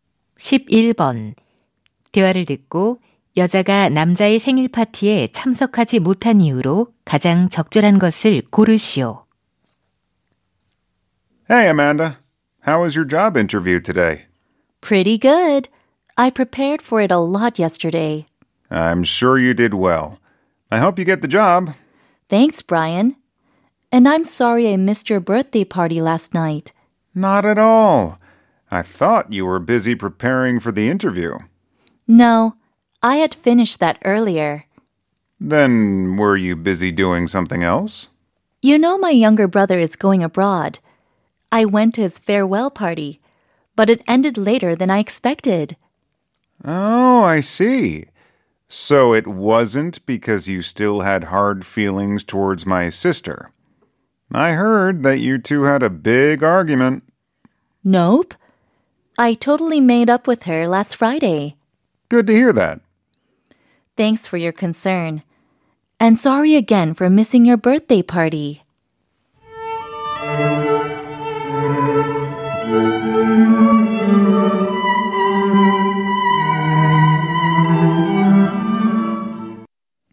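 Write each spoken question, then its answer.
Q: 대화를 듣고 여자가 남자의 생일 파티에 참석하지 못한 이유로 가장 적절한 것을 고르시오.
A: 남동생의 송별회에 가서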